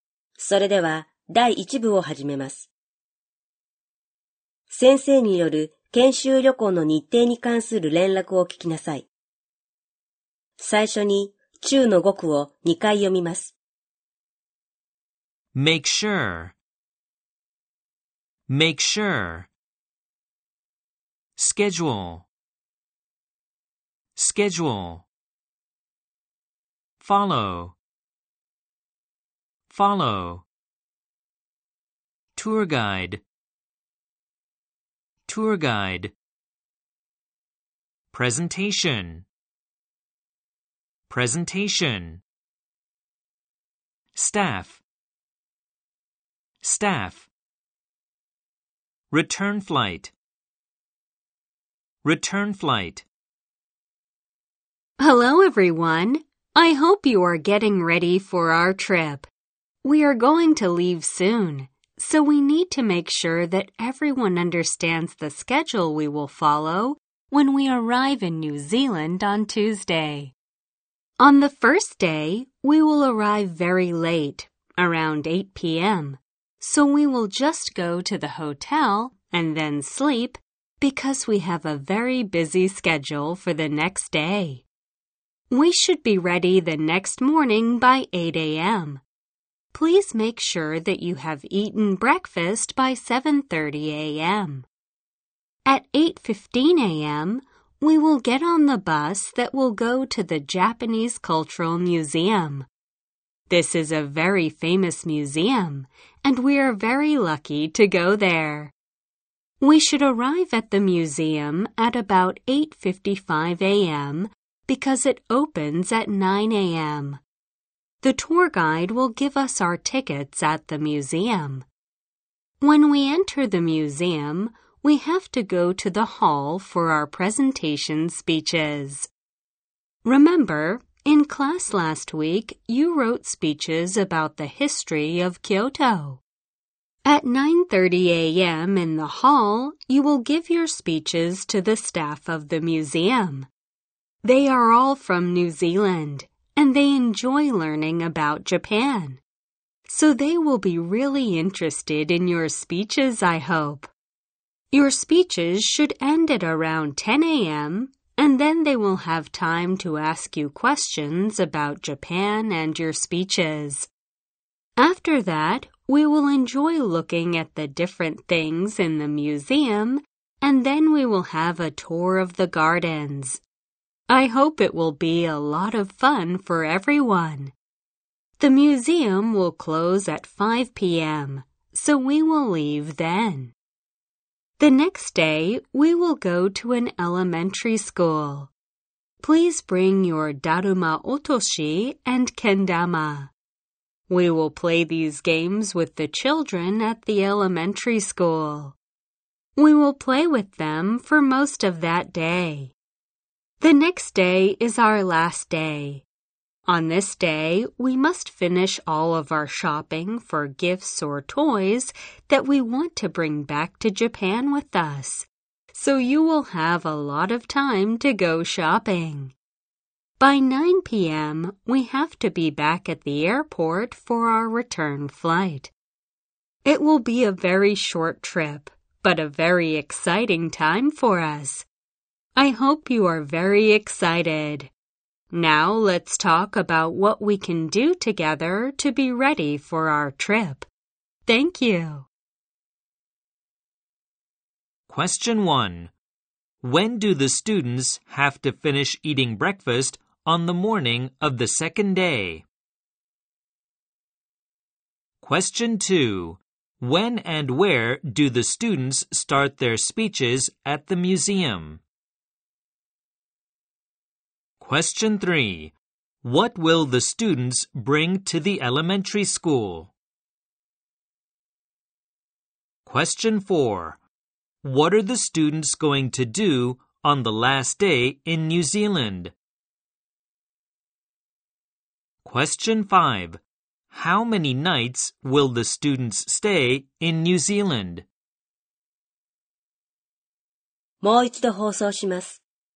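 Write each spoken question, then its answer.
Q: When do the students have to finish eating breakfast on the morning of the second day?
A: By 7:30 a.m.

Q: When and where do the students start their speeches at the museum?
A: At 9:30 a.m. in the hall

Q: What will the students bring to the elementary school?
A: Their Daruma Otoshi and Kendama

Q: What are the students going to do on the last day in New Zealand?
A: Go shopping for gifts or toys to bring back to Japan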